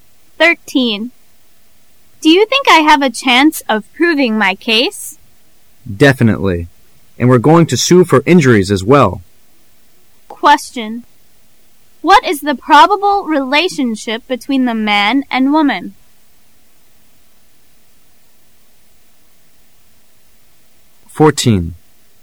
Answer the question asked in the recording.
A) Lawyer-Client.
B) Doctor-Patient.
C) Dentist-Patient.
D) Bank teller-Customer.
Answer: A) Lawyer-Client.

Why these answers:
W: Do you think I have a chance of proving my case? M: Definitely, and we're going to sue for injuries as well. Q: What is the probable relationship between the man and woman? [试题分析]本题考查根据文中内容来辨别两人的关系。 [关键词语]proving my case,sue for injuries. [详细解答]从文中对话可听出proving my case,和 sue for injuries几个法律专用词汇,因而可判断两人与法律有关。再由选择中可判断出问题大致为 "What's the relationship between the two people?"所以应选A。

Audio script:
A
[解析] W: Do you think I have a chance of proving my case? M: Definitely, and we're going to sue for injuries as well. Q: What is the probable relationship between the man and woman?